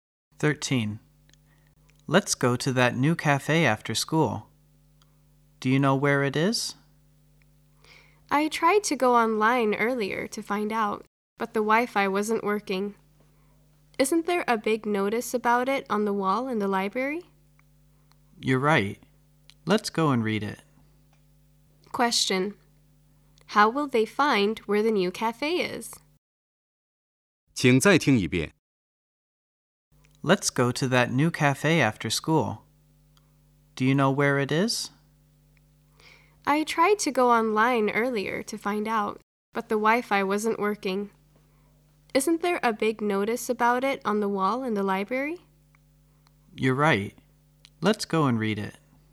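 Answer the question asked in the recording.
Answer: By reading the notice on the library wall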